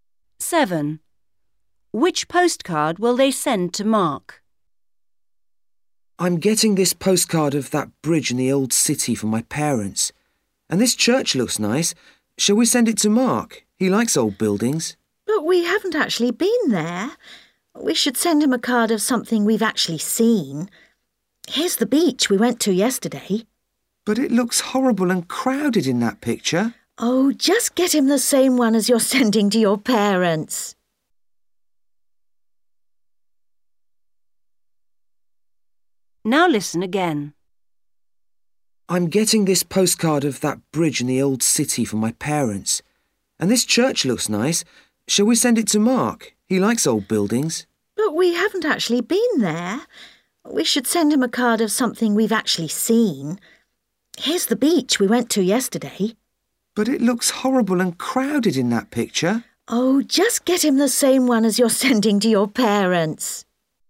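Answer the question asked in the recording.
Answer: the bridge in the old city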